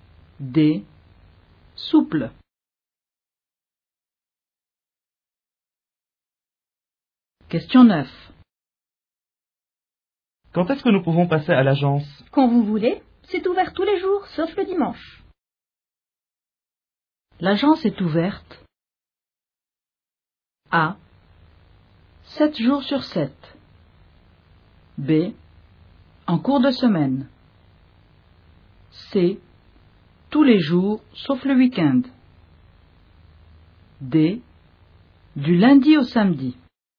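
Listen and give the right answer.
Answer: D: Du lundi au samedi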